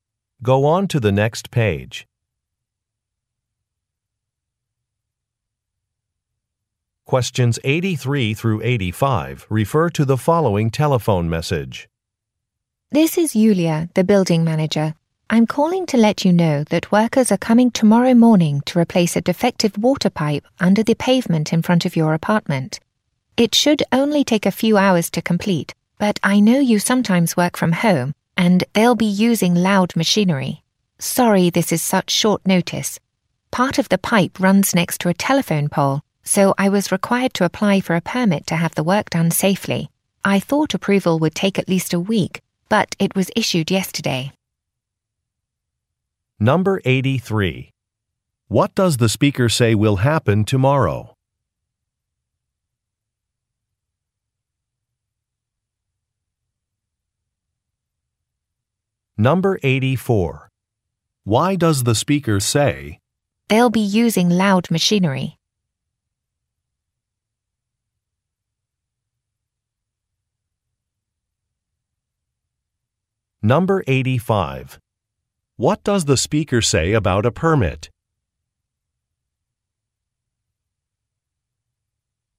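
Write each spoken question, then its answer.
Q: What does the speaker say will happen tomorrow?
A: A water pipe will be replaced

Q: What does the speaker say about a permit?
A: It was approved sooner than expected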